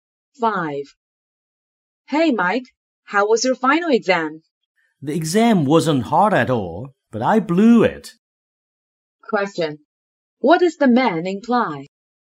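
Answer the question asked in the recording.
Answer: He did badly in the exam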